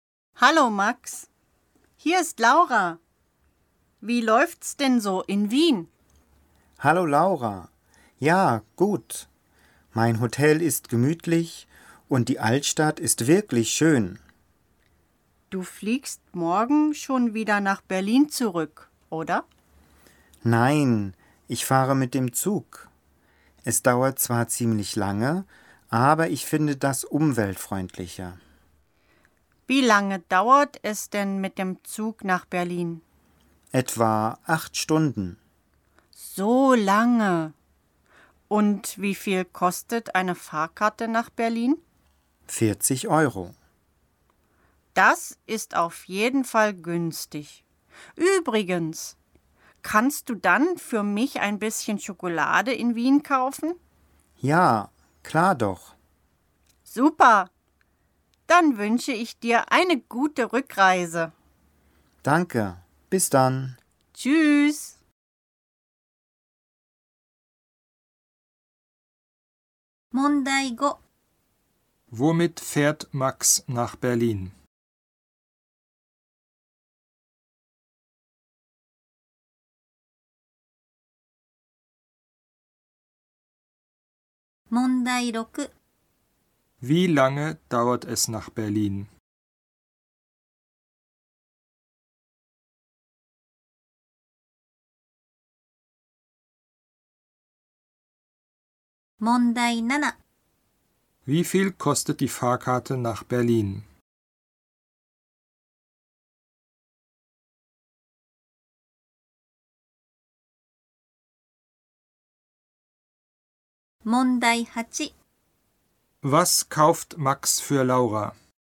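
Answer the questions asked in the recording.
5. Mit dem Zug
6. Etwa 8 Stunden
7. 40 Euro
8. Schokolade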